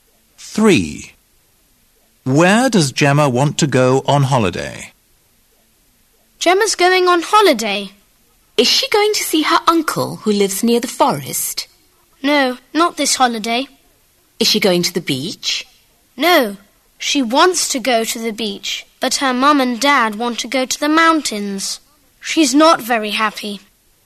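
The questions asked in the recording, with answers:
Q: Where does Gemma want to go on holiday?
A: the beach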